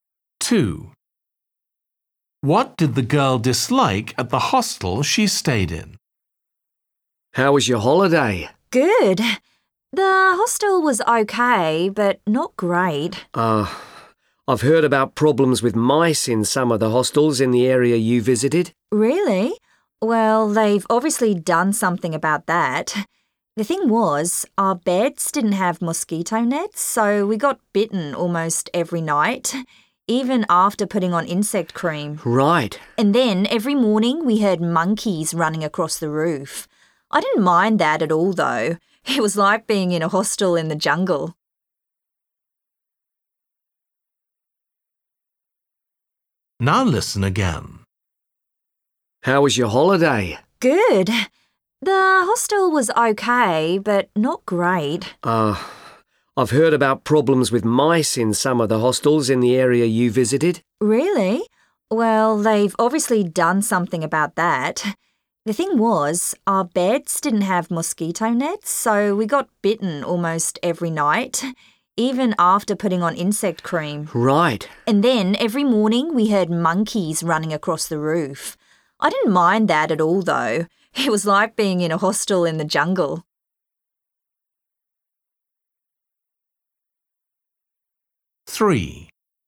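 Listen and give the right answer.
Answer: The mosquitoes (no mosquito nets, getting bitten)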